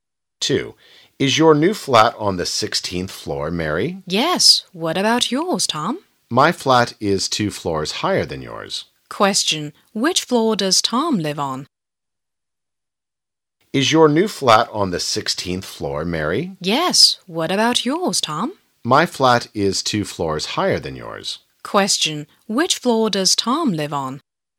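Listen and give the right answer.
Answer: The 18th floor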